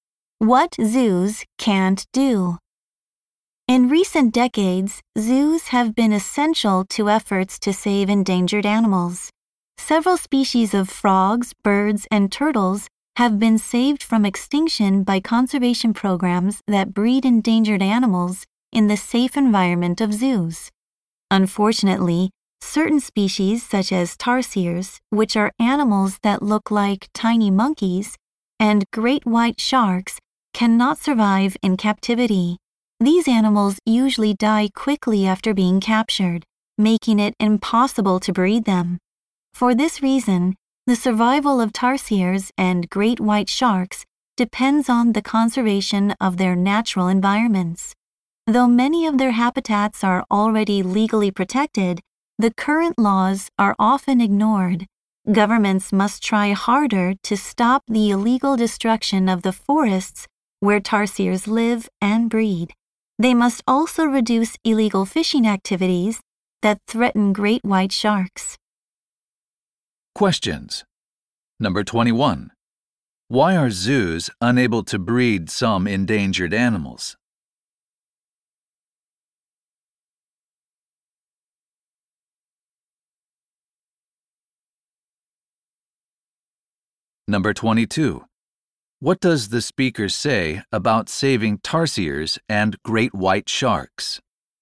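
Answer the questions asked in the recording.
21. Some species cannot survive in captivity and die quickly after capture.
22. It depends on conserving their natural habitats; governments must enforce laws against illegal destruction and fishing.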